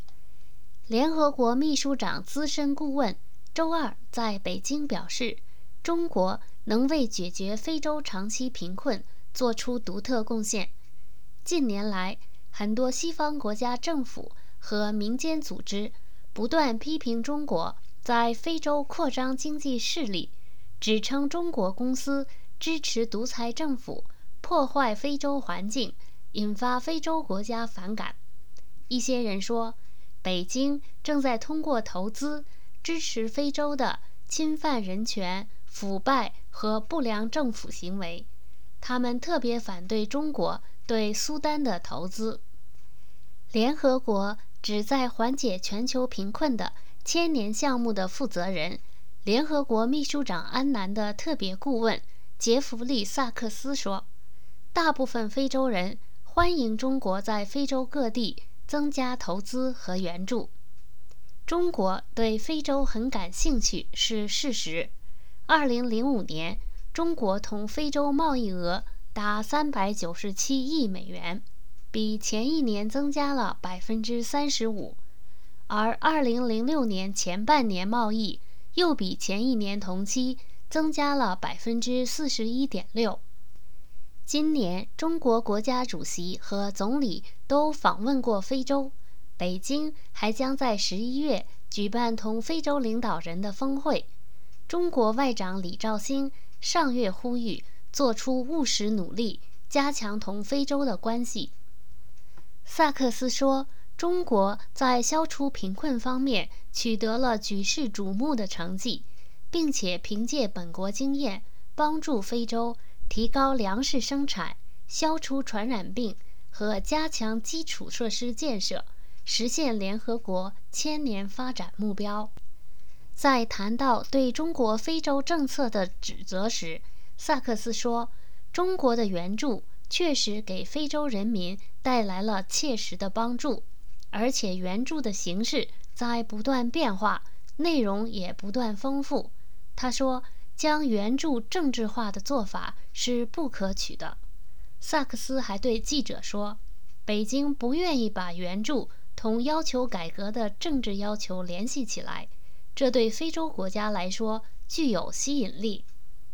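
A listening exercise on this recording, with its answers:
Please answer the following questions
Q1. 一些西方国家政府和民间组织对中国在非洲投资有何批评?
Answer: 批评中国在非洲扩张经济势力,支持独裁政府,破坏非洲环境,支持侵犯人权、腐败和不良政府行为,特别反对中国对苏丹的投资

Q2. 2005年中国同非洲的贸易额是多少?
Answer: 397亿美元

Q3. 联合国秘书长安南的特别顾问萨克斯认为中国在非洲作了哪些工作?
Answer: 凭借本国经验帮助非洲提高粮食生产、消除传染病和加强基础设施建设

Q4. 萨克斯如何评价中国对非洲的援助?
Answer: 中国的援助给非洲人民带来了切实的帮助,援助形式不断变化,内容不断丰富

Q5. 萨克斯看来,为什么中国的援助对非洲有吸引力?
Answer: 因为北京不把援助同要求改革的政治要求联系起来

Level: 3rd Year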